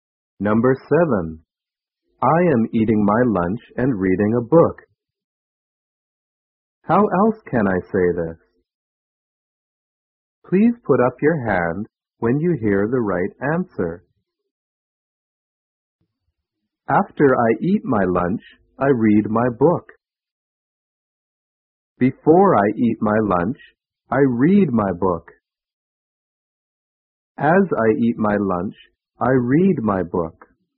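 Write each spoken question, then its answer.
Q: How else can I say this?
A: As I eat my lunch, I read my book.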